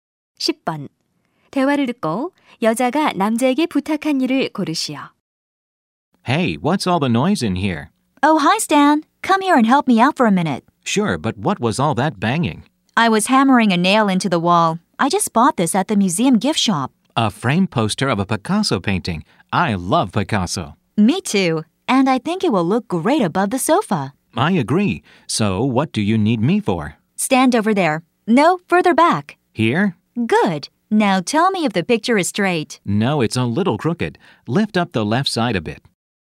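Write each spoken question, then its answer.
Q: 대화를 듣고 여자가 남자에게 부탁한 일을 고르시오.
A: 그림이 똑바로 걸렸는지 봐 주기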